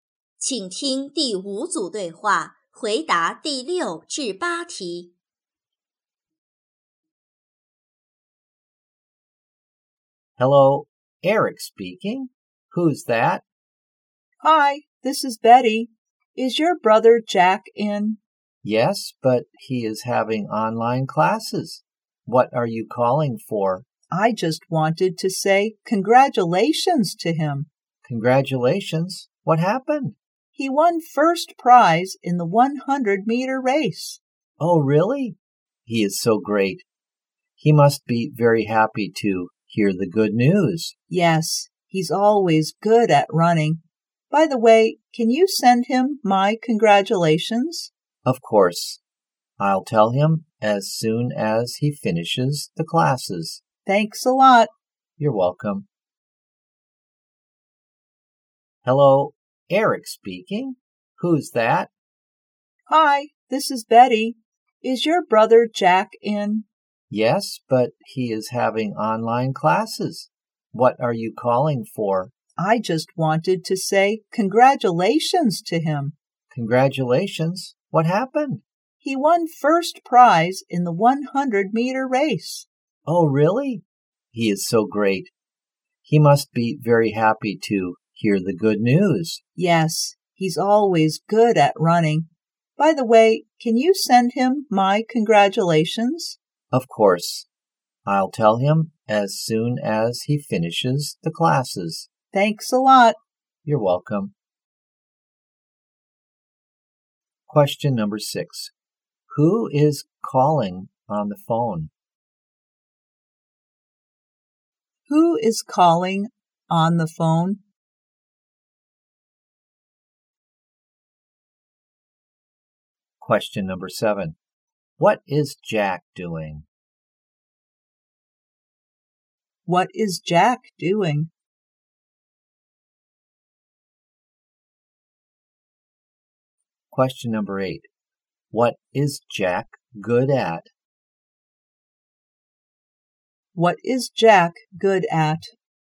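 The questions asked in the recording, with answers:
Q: Who is calling on the phone?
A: Betty

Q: What is Jack doing?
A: Having online classes

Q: What is Jack good at?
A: Running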